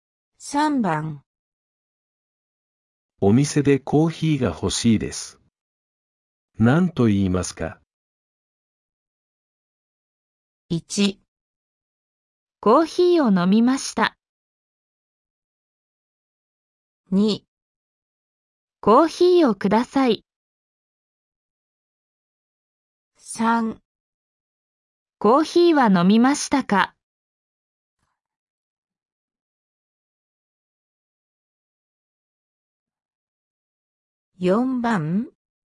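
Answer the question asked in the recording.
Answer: 2

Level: N5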